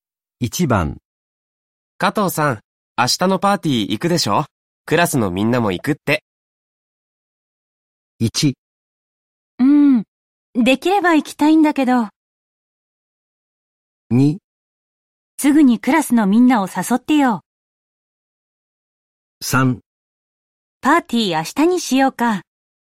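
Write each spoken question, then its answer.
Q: 加藤さん、明日のパーティー行くでしょ?クラスのみんなも行くって。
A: 1: できれば行きたいんだけど。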